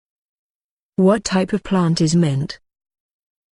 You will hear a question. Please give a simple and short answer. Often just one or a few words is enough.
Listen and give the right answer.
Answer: Herb